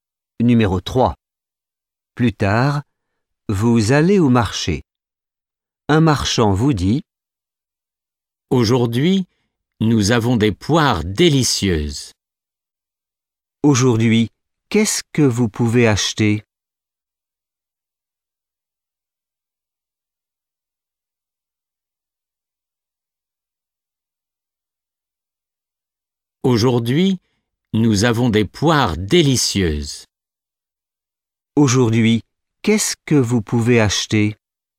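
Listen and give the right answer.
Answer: Des poires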